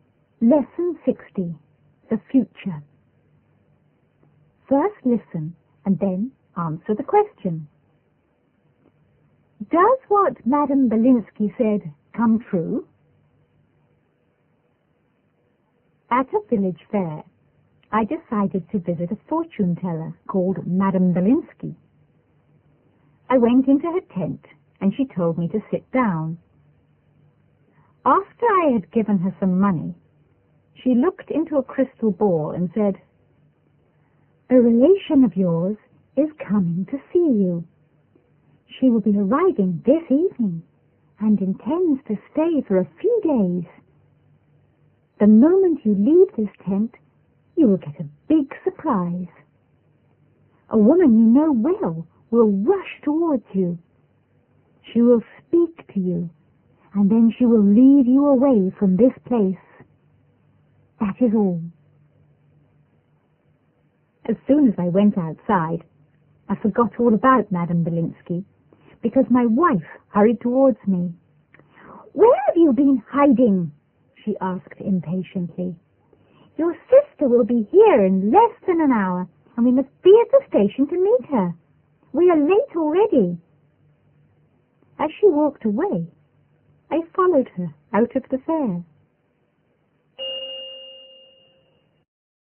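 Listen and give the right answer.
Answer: Yes, it does: his wife rushed to him and led him away to meet his sister, who was coming to visit.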